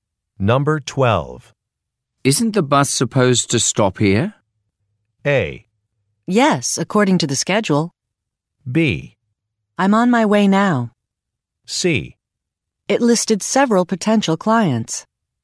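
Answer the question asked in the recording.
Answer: A: Yes, according to the schedule.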